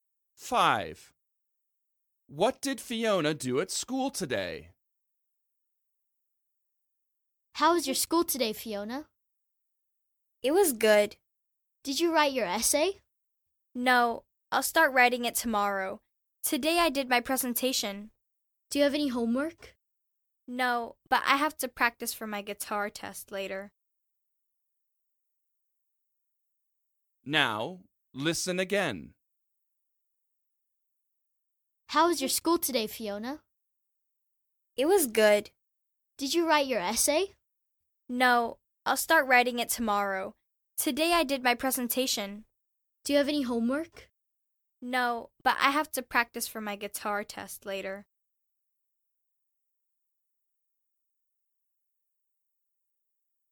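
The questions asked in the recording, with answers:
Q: What did Fiona do at school today?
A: Her presentation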